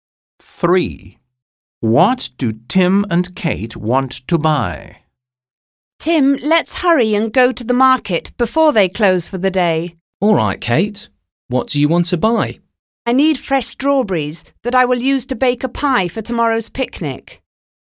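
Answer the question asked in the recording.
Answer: strawberries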